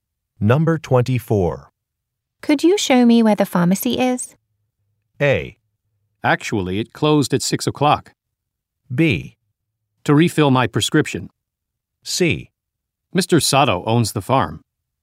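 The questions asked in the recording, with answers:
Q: Could you show me where the pharmacy is?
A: A: Actually, it closed at 6 o'clock.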